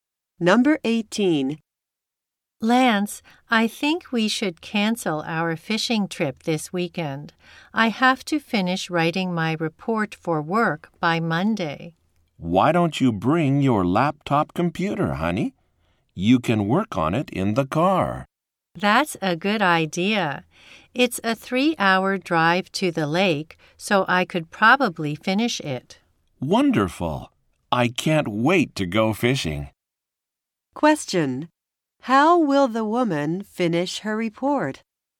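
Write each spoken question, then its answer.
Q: How will the woman finish her report?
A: By working on her laptop in the car.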